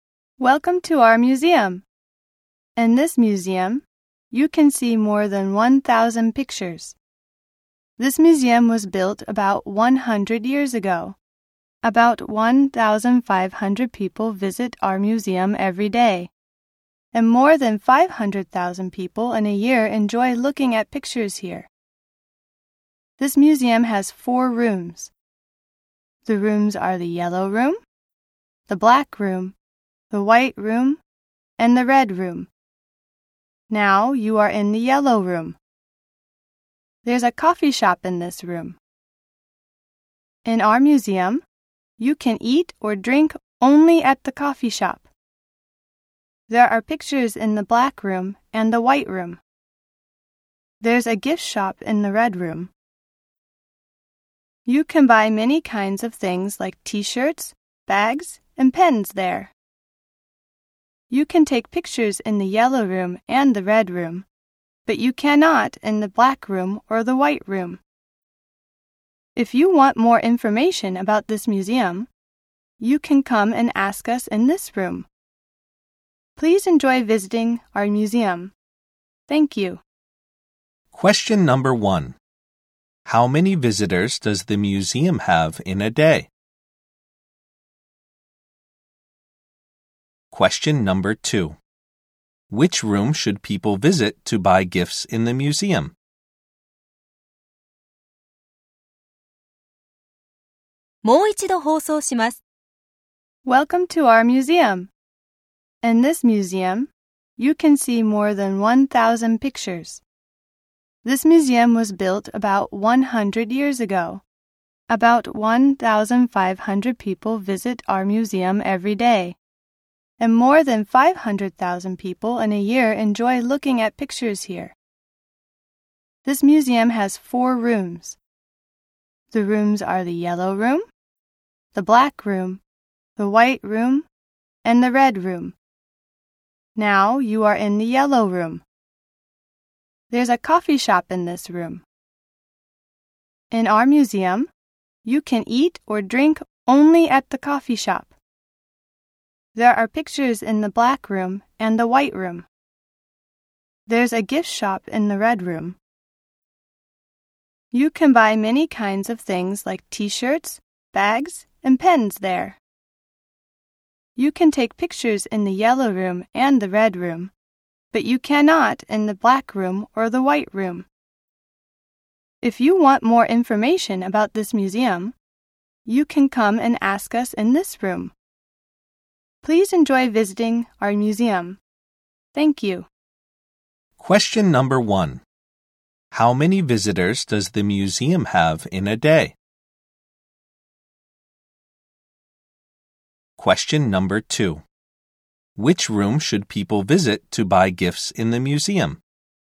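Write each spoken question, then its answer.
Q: How many visitors does the museum have in a day?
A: About 1,500

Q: Which room should people visit to buy gifts in the museum?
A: The red room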